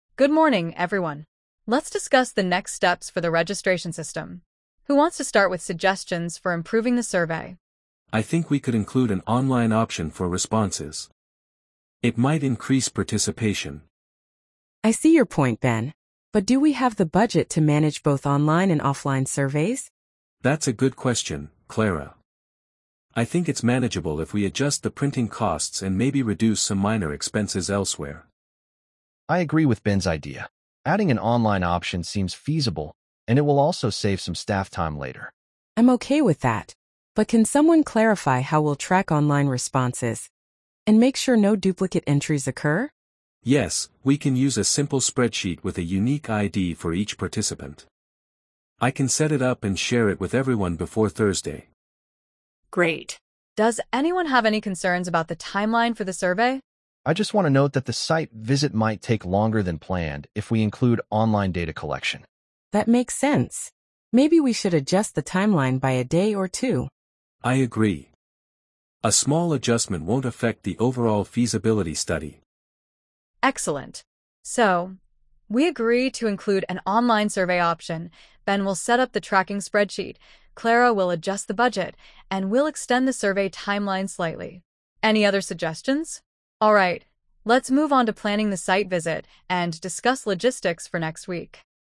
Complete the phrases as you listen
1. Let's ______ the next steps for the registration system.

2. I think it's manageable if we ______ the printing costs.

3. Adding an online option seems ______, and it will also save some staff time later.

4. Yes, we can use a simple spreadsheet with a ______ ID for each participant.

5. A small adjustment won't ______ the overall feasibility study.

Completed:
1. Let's discuss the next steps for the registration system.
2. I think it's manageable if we adjust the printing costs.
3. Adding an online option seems feasible, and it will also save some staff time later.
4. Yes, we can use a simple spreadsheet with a unique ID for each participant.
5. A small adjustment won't affect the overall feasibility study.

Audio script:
ANNA: Good morning, everyone. Let's discuss the next steps for the registration system. Who wants to start with suggestions for improving the survey?
BEN: I think we could include an online option for responses. It might increase participation.
CLARA: I see your point, Ben. But do we have the budget to manage both online and offline surveys?
BEN: That's a good question, Clara. I think it's manageable if we adjust the printing costs and maybe reduce some minor expenses elsewhere.
DAVID: I agree with Ben's idea. Adding an online option seems feasible, and it will also save some staff time later.
CLARA: I'm okay with that. But can someone clarify how we'll track online responses and make sure no duplicate entries occur?
BEN: Yes, we can use a simple spreadsheet with a unique ID for each participant. I can set it up and share it with everyone before Thursday.
ANNA: Great. Does anyone have any concerns about the timeline for the survey?
DAVID: I just want to note that the site visit might take longer than planned if we include online data collection.
CLARA: That makes sense. Maybe we should adjust the timeline by a day or two.
BEN: I agree. A small adjustment won't affect the overall feasibility study.
ANNA: Excellent. So, we agree to include an online survey option, Ben will set up the tracking spreadsheet, Clara will adjust the budget, and we'll extend the survey timeline slightly. Any other suggestions? (pause) Alright, let's move on to planning the site visit and discuss logistics for next week.